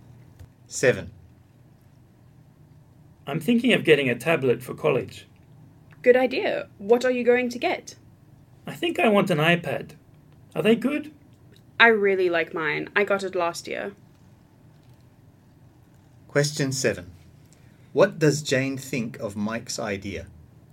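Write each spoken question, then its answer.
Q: What does Jane think of Mike's idea?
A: She thinks it's a good idea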